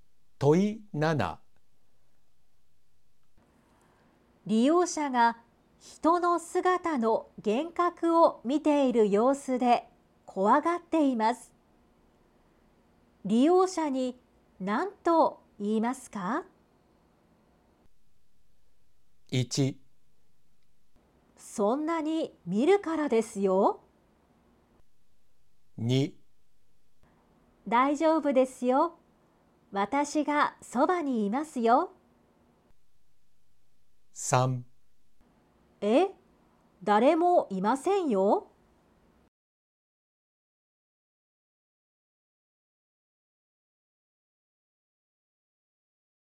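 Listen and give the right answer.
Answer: 2: 大丈夫ですよ。私がそばにいますよ。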